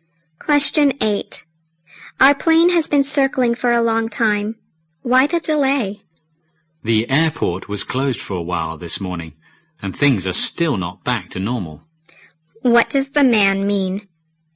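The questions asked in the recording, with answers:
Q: What does the man mean?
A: The plane is delayed because the airport was closed for a while this morning and things are still not back to normal.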